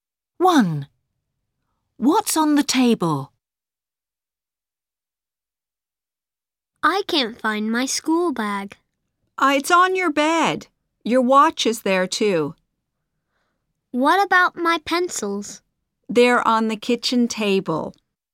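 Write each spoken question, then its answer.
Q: What's on the table?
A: pencils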